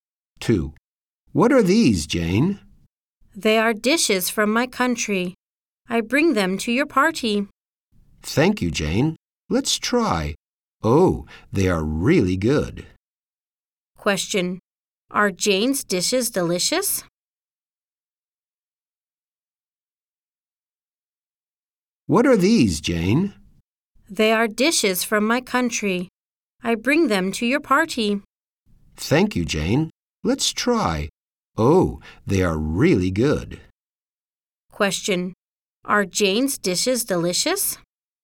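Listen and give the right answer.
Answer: Yes, they are.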